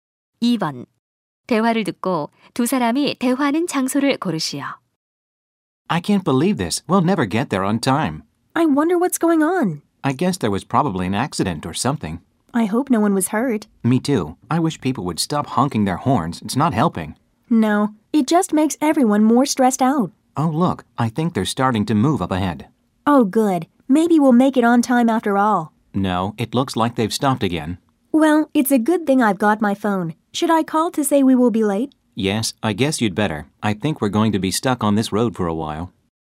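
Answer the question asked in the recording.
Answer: 교통 체증에 갇힌 도로 위의 차 안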